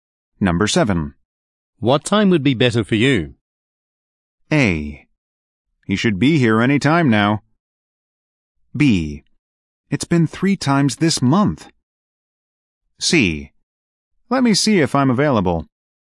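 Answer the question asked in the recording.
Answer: C: Let me see if I'm available.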